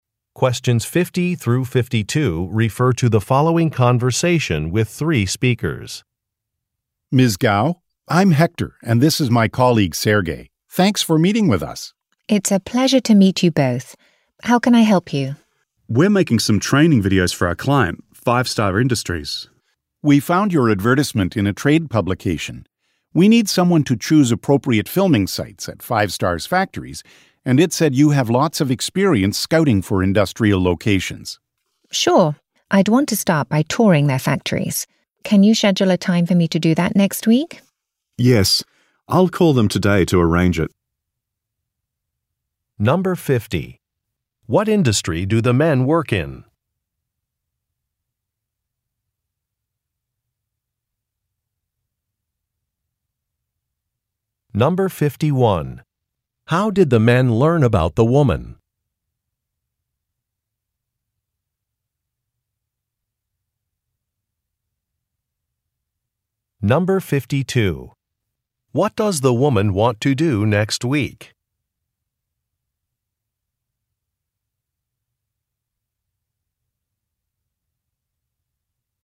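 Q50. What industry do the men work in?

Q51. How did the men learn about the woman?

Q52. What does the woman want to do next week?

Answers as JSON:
{"50": "Video production", "51": "From an advertisement in a trade publication", "52": "Tour the client's factories"}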